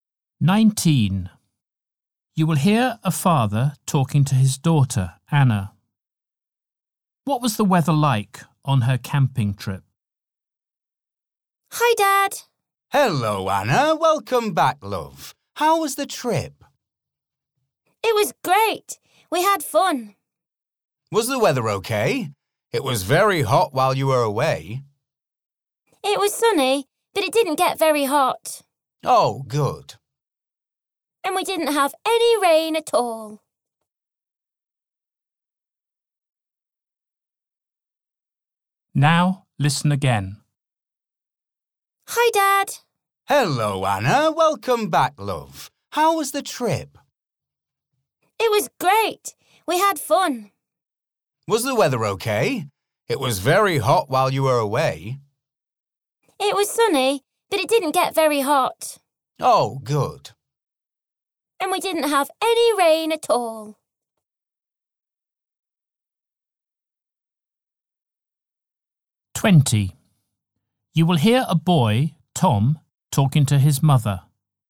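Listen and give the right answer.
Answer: sunny but not very hot, with no rain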